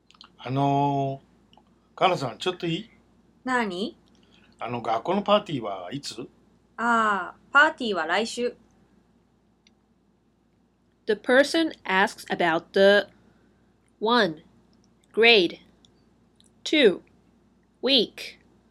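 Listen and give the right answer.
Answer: 2: Week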